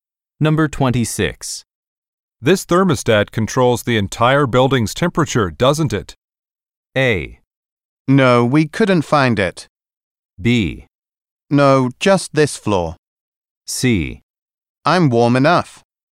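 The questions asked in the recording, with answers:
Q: This thermostat controls the entire building's temperature, doesn't it?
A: B: No, just this floor.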